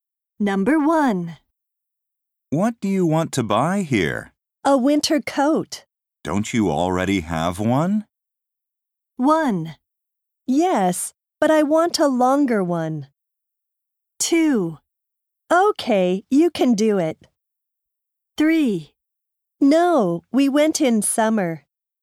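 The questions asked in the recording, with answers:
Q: Don't you already have one?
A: 1: Yes, but I want a longer one.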